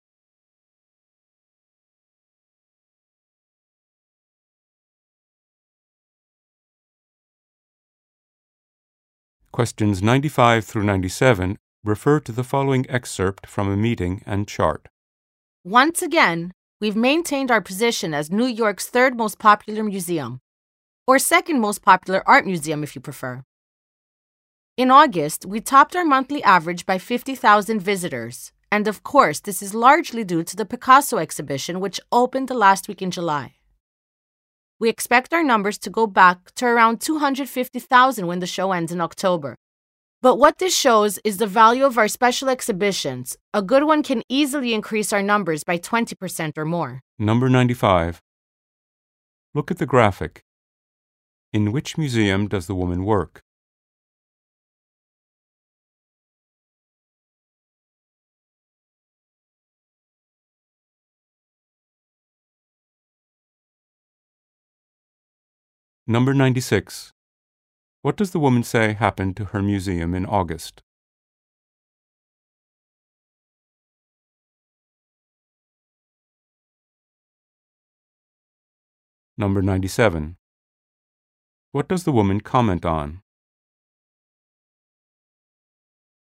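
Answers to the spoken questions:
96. Visitors were 50,000 above the monthly average
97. The value of special exhibitions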